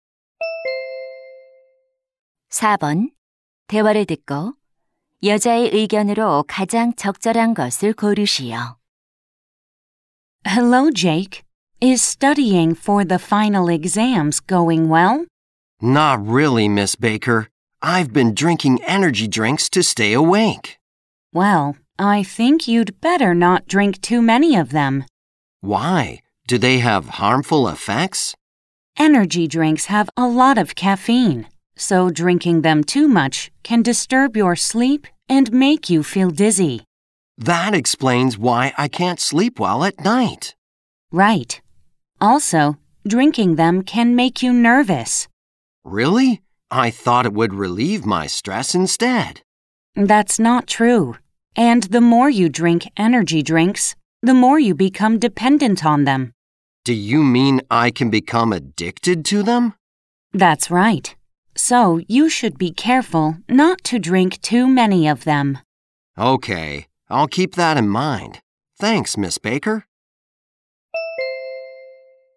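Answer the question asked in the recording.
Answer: 에너지 음료를 너무 많이 마시지 않는 것이 좋다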